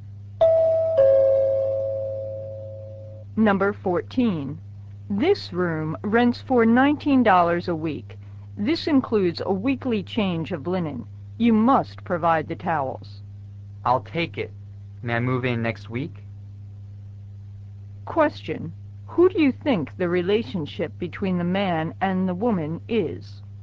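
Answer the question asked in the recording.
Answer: Landlord and tenant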